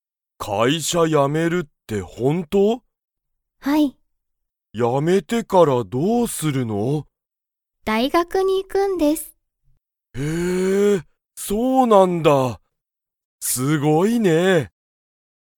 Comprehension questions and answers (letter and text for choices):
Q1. 山田やまださんは、____を辞やめる。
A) 会社かいしゃ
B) 大学だいがく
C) 友達ともだち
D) 学校がっこう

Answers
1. A) 会社かいしゃ

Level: Level 1